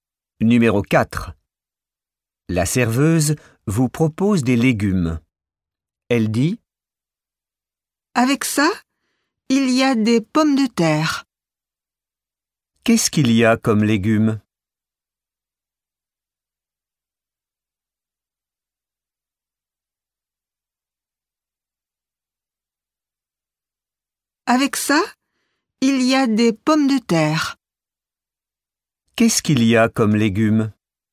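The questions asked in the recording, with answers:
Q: Qu'est-ce qu'il y a comme légumes?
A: Des pommes de terre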